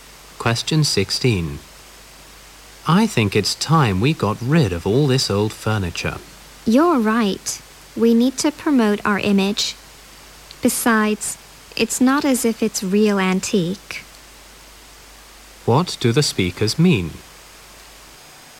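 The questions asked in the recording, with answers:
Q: What do the speakers mean?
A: They agree to get rid of the old furniture because it is not real antique and they need to improve their image.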